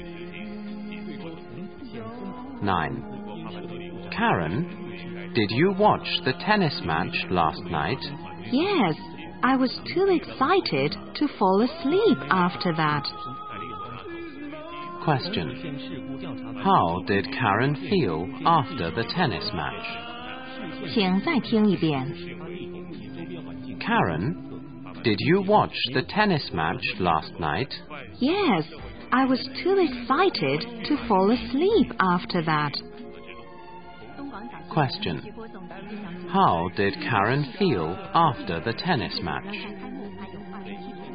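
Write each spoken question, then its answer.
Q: How did Karen feel after the tennis match?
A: Too excited to fall asleep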